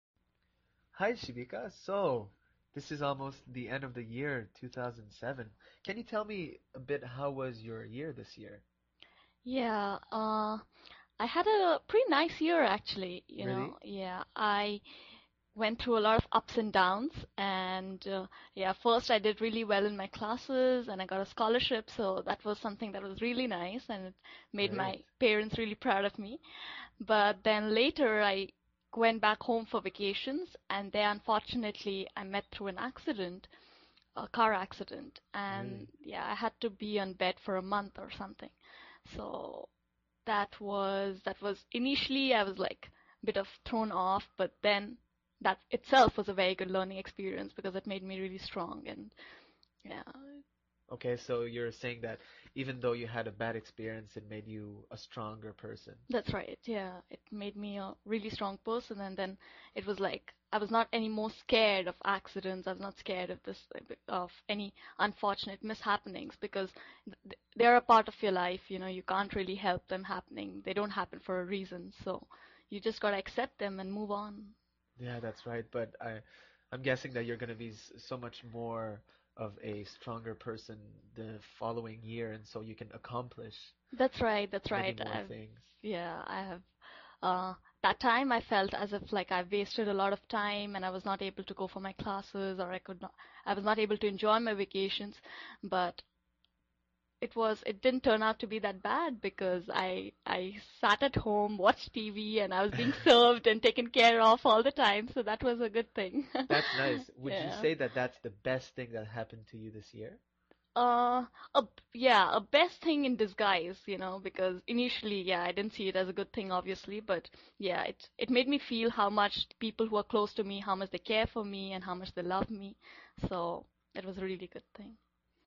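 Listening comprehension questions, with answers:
用 1-2 句话用自己的话回答下面的问题。点「✨ AI 判断」后,AI 会对照当天 transcript 给出参考要点与评分。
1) What was the first positive event Shibika mentioned that made her parents proud this year?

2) What specific accident did Shibika experience, and how long did she have to stay in bed?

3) What two activities did Shibika say she did while recovering at home, and what did people do for her?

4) According to Shibika, what did the accident ultimately make her realize about the people close to her?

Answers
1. She did really well in her classes and got a scholarship.
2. A car accident; she was in bed for about a month.
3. She sat at home and watched TV; people served her and took care of her all the time.
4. How much the people close to her care for her and love her.

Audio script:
Hi, Shibika, so this is almost the end of the year, 2007. Can you tell me a bit, how was your year this year?
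Shibika
Yeah, I had pretty nice year actually. I went through a lot of ups and downs , and yeah, at first I did really well in my classes and I got a scholarship so that was something that was really nice. It made my parents really proud of me, but then later I went back home for vacation and then unfortunately, I met through an accident, a car accident, and yeah, I had to be in bed for a month or something, so that was... initially I was like, a bit of thrown off but then that itself was a very good learning experience because it made me really strong and, yeah...
OK, so you're saying that even though you had a bad experience, it made you a stronger person.
Shibika
That's right. Yeah. It made me a really strong person and then it was like, I was not anymore more scared of accidents and I was not scared of any unfortunate mishappenings because they're a part of your life, you know, you can't really help them happening, they don't happen for reason, so you just got to accept them and move on .
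Yeah, that's right but I'm guessing that you're gonna be so much more of a stronger person the following year and so you can accomplish...
Shibika
FredYeah, that's right but I'm guessing that you're gonna be so much more of a stronger person the following year and so you can accomplish...
ShibikaThat's right. That's right.
FredMany more things.
At that time I felt as if like I had wasted a lot of time and I was not able to go for my classes or I could not... I was not able to enjoy my vacations but it was, it didn't turn out to be that bad because I sat at home, watched TV and I was being served and taken care of all the time so that was a good thing.
You can say that that's the best thing that happened to you this year.
The best thing in disguise , you know, because initially I didn't see it as a good thing obviously but, yeah, it made me feel how much people who are close to me, how much they care for me and how much they love me, so it was a really good thing.

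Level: CEFRB1-B2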